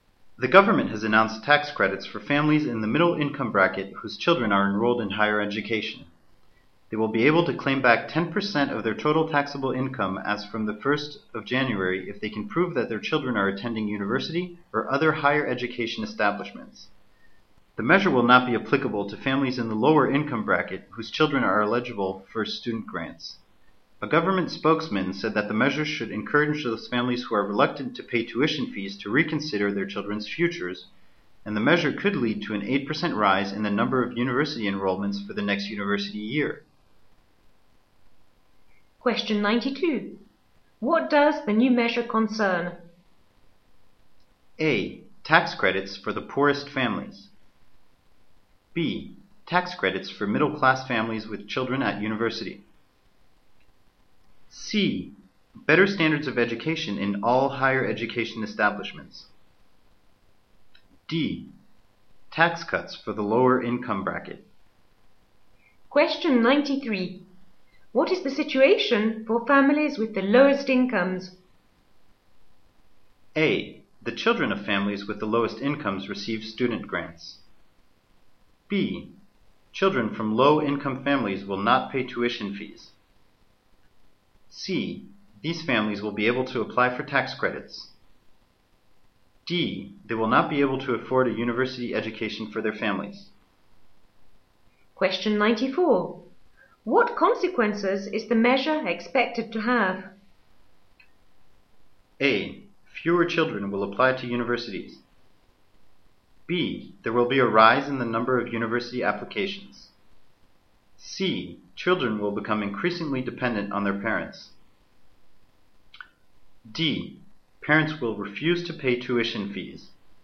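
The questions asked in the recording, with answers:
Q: What does the new measure concern?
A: B: Tax credits for middle-class families with children at university.

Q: What is the situation for families with the lowest incomes?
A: A: The children of families with the lowest incomes receive student grants.

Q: What consequences is the measure expected to have?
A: B: There will be a rise in the number of university applications.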